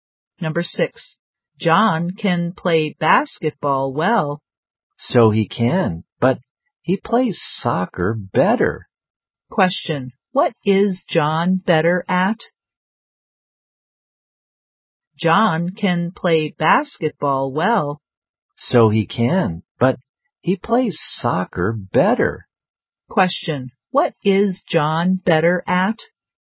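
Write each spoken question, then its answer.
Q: what is John better at?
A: Soccer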